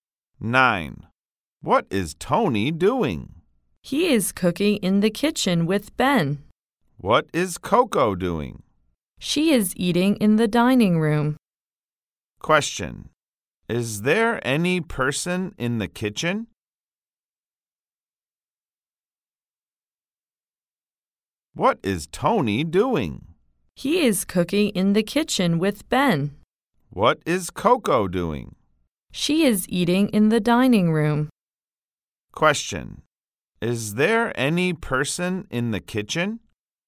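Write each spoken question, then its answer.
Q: Is there any person in the kitchen?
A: Yes, Tony and Ben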